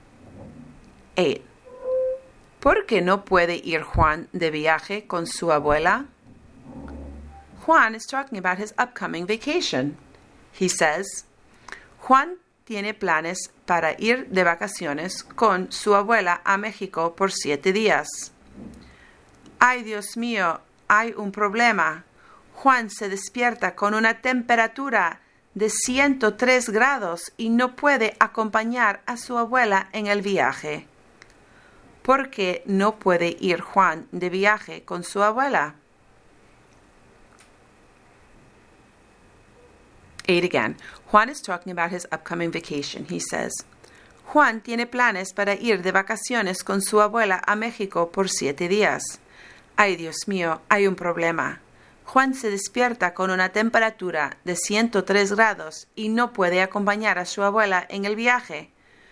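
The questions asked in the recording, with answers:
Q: ¿Por qué no puede ir Juan de viaje con su abuela?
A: Porque tiene fiebre (103 grados)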